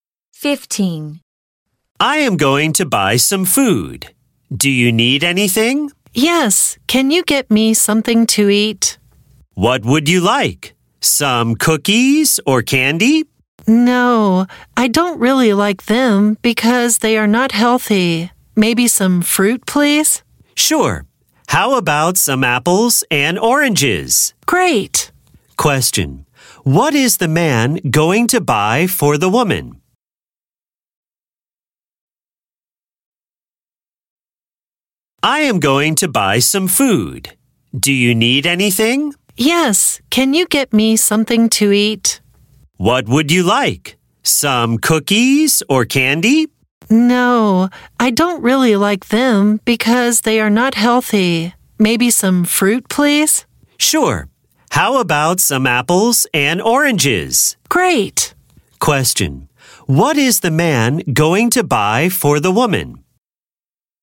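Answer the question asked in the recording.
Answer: Some fruit: apples and oranges.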